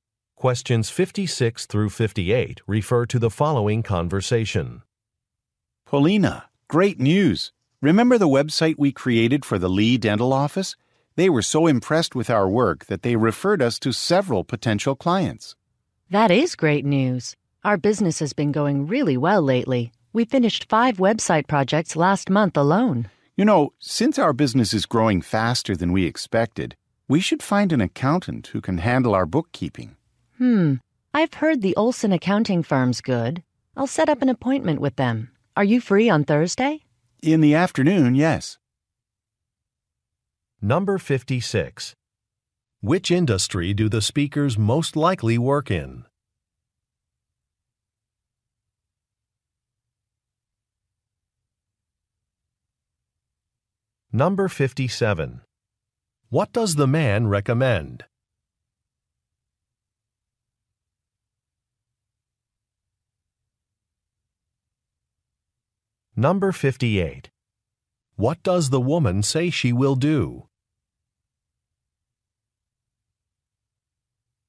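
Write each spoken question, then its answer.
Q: Which industry do the speakers most likely work in?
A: Website design

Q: What does the man recommend?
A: Hiring an accountant

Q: What does the woman say she will do?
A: Set up an appointment with an accounting firm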